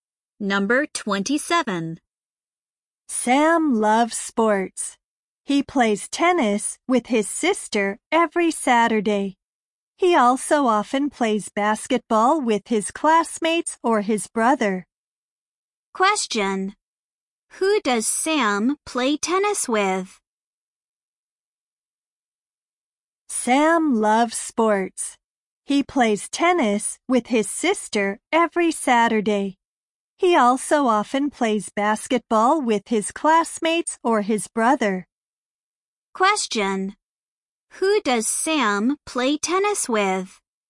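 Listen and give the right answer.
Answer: His sister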